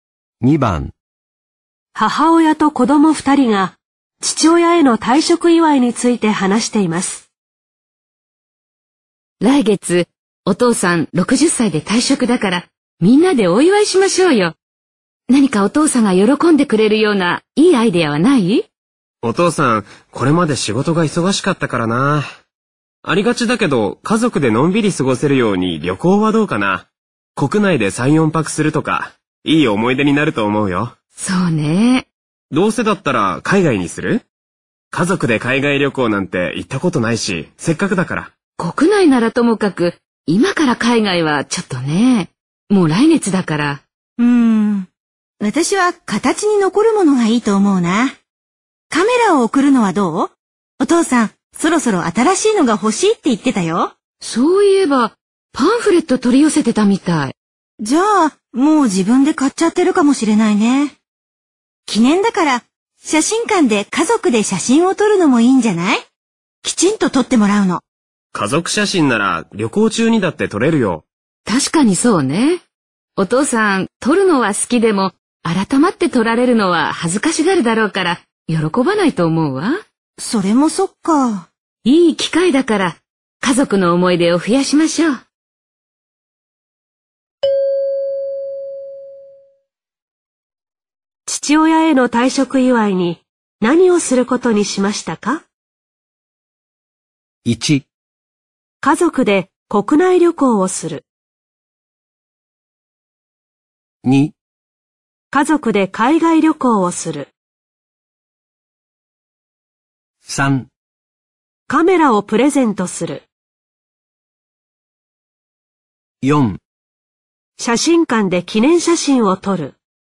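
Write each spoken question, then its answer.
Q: 父親への退職祝いに何をすることにしましたか?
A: 1: 家族で国内旅行をする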